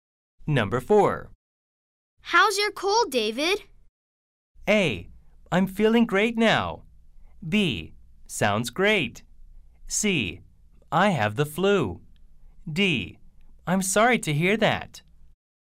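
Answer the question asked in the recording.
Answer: A: I'm feeling great now.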